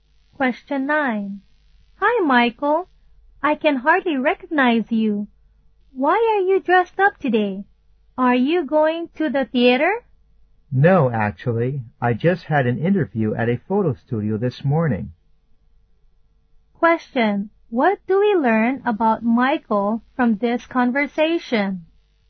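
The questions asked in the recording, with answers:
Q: What do we learn about Michael from this conversation?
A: He dressed up for a job interview at a photo studio.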